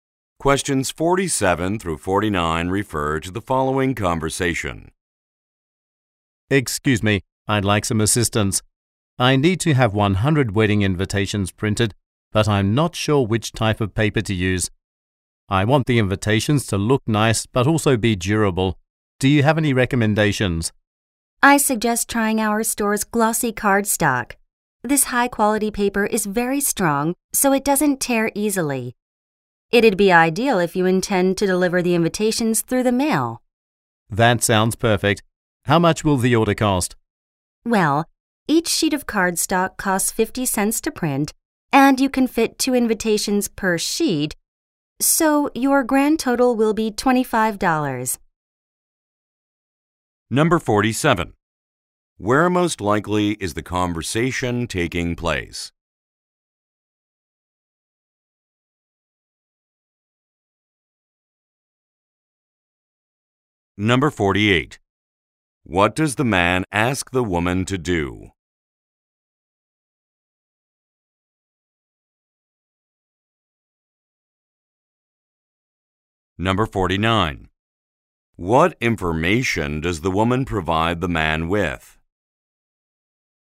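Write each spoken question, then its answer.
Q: Where most likely is the conversation taking place?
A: At a print shop

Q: What does the man ask the woman to do?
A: Recommend a paper

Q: What information does the woman provide the man with?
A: The total cost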